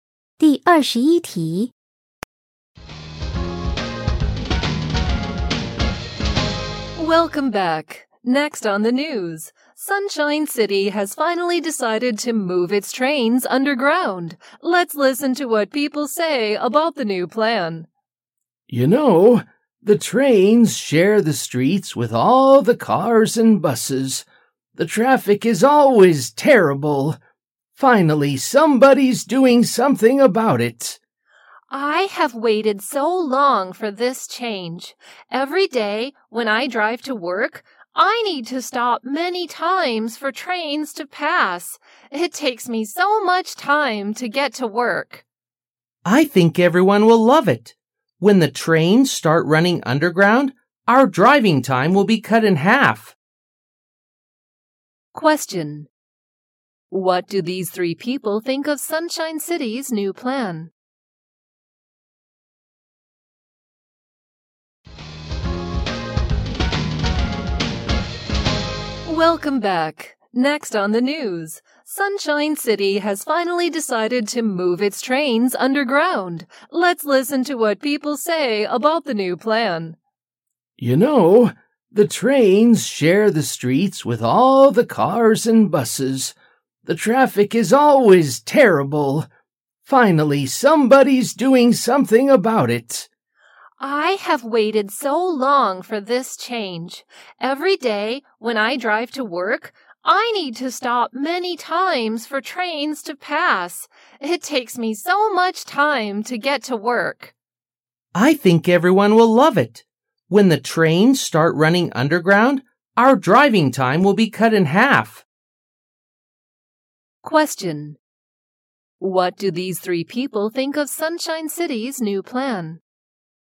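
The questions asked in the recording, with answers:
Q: What do these three people think of Sunshine City's new plan?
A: They all like it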